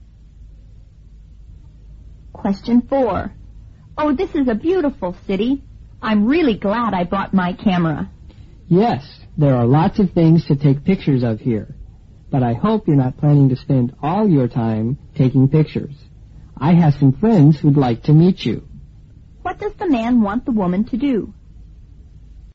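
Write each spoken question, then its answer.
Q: What does the man want the woman to do?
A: Meet his friends instead of spending all her time taking pictures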